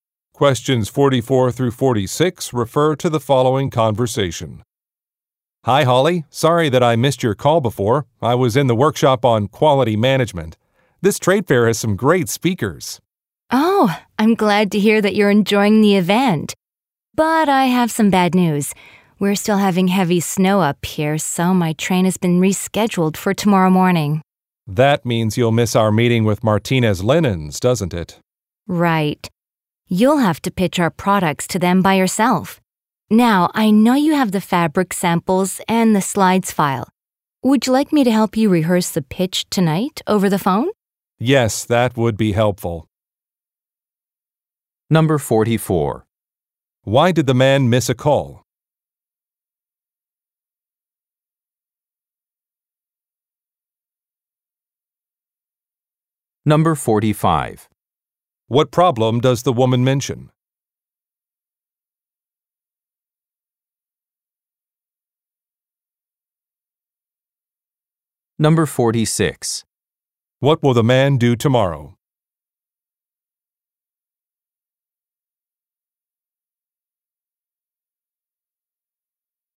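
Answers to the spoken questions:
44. He was attending a workshop on quality management.
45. Heavy snow has caused her train to be rescheduled for tomorrow morning.
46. Pitch their products to Martinez Linens by himself.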